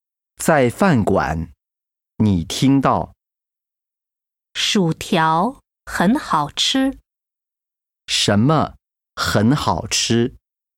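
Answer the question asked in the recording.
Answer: 薯条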